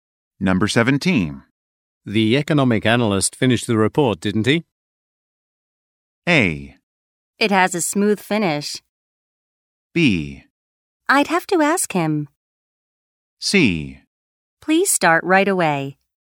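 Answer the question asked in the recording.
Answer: B: I'd have to ask him.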